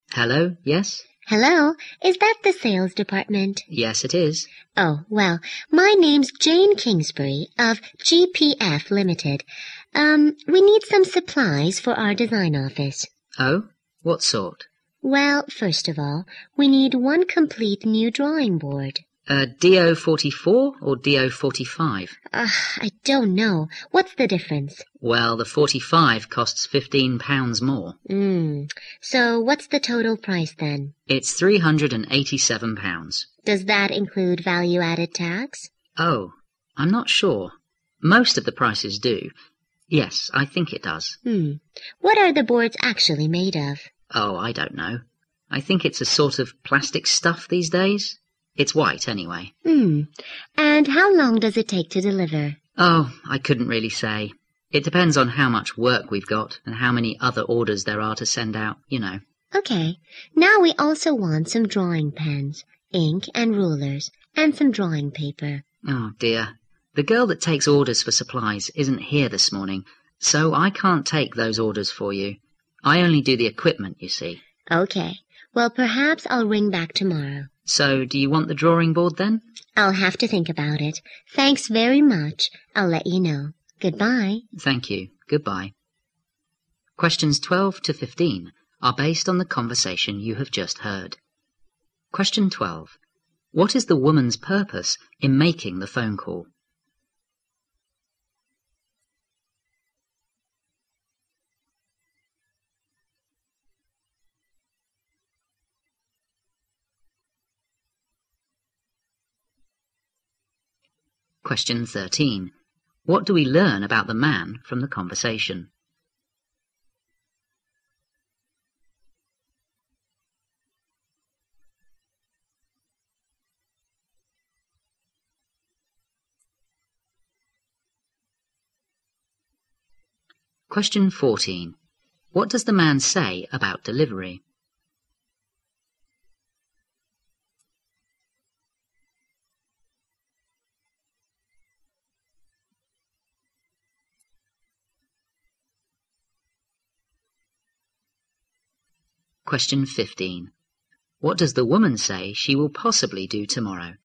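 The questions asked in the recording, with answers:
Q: What is the woman's purpose in making the phone call?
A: To order supplies for her design office

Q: What does the man say about delivery?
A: He can't say how long it will take; it depends on workload and other orders

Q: What does the woman say she will possibly do tomorrow?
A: Ring back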